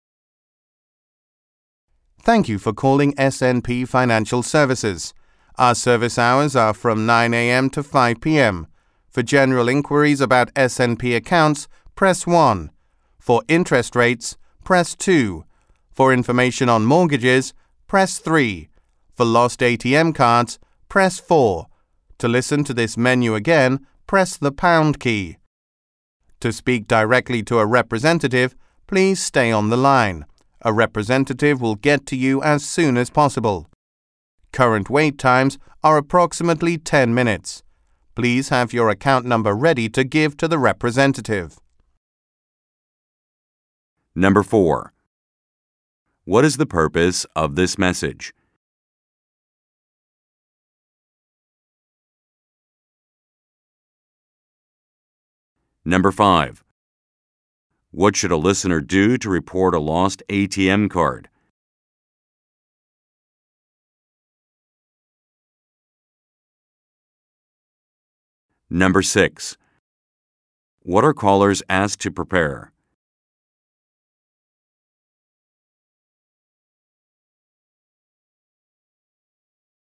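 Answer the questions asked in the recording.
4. To direct callers to the right service options at SNP Financial Services
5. Press 4
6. Their account number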